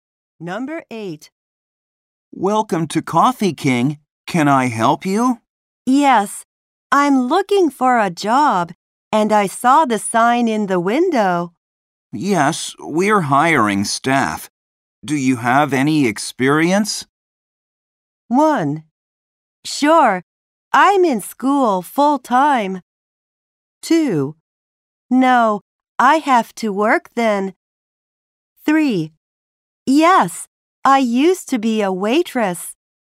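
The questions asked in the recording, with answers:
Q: Yes, we're hiring staff. Do you have any experience?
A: 3: Yes, I used to be a waitress.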